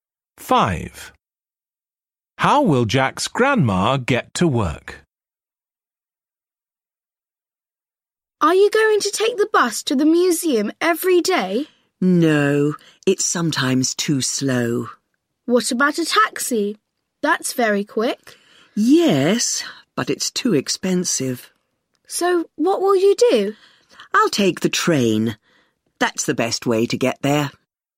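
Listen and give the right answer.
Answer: by train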